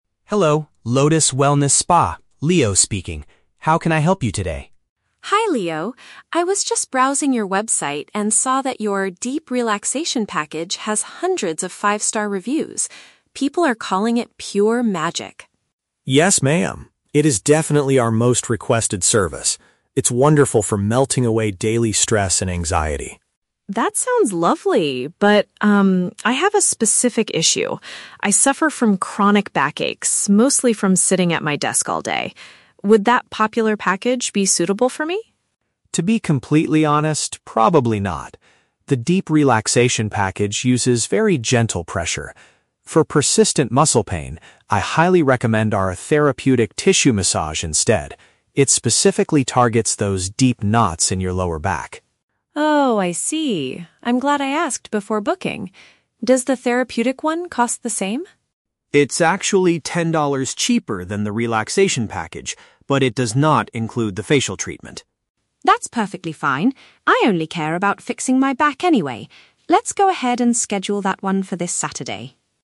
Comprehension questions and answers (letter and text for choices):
Listen to a phone conversation between a customer and a spa consultant. Choose the correct answer (A, B, or C).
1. Why is the woman calling the spa?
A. To complain about a terrible massage.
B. To ask about a highly-rated service.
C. To apply for a job as a therapist.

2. Why does the consultant advise against the 'Deep Relaxation Package'?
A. It is too soft to treat severe physical pain.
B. It does not include a facial beauty treatment.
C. It is currently fully booked until next week.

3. What is true about the service the woman finally chooses?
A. It includes a complimentary face massage.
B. It is only available on the weekends.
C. It costs less money than the popular package.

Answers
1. B. To ask about a highly-rated service.
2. A. It is too soft to treat severe physical pain.
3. C. It costs less money than the popular package.

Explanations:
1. Mary says she saw a package with "hundreds of five-star reviews" on their website. "Five-star reviews" is a B1 paraphrase for "highly-rated". The Trap: Option (A) is a trap. The word "review" might make students think of complaints, but Mary is calling about good reviews, not a bad experience. Option (C) is completely unmentioned.
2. Leo says the relaxation package uses "very gentle pressure" and recommends a different one for her "persistent muscle pain" (chronic back aches). "Gentle pressure" means the massage is "too soft" for her specific problem. The Trap: Option (B) is a trap. The facial treatment is mentioned in the audio, but it is missing from the Therapeutic package, not the Deep Relaxation one. Option (C) is a logical real-world reason but is not mentioned.
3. Leo states that the therapeutic massage is "ten dollars cheaper than the relaxation package." "Cheaper" is a direct synonym for "costs less money." The Trap: Option (A) is the exact opposite of what is said (The Trap of Contradiction). Leo explicitly says it "does not include" the facial treatment. Option (B) is a trap because Mary books it for "this Saturday" (the weekend), but Leo never says it is only available on weekends.

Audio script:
Leo: Hello, Lotus Wellness Spa, Leo speaking. How can I help you today?
Mary: Hi Leo. I was just browsing your website and saw that your 'Deep Relaxation Package' has hundreds of five-star reviews. People are calling it pure magic.
Leo: Yes, ma'am! It is definitely our most requested service. It's wonderful for melting away daily stress and anxiety.
Mary: That sounds lovely, but, um, I have a specific issue. I suffer from chronic back aches, mostly from sitting at my desk all day. Would that popular package be suitable for me?
Leo: To be completely honest, probably not. The Deep Relaxation package uses very gentle pressure. For persistent muscle pain, I highly recommend our 'Therapeutic Tissue Massage' instead. It specifically targets those deep knots in your lower back.
Mary: Oh, I see. I'm glad I asked before booking. Does the therapeutic one cost the same?
Leo: It's actually ten dollars cheaper than the relaxation package, but it does not include the facial treatment.
Mary: That's perfectly fine, I only care about fixing my back anyway. Let's go ahead and schedule that one for this Saturday.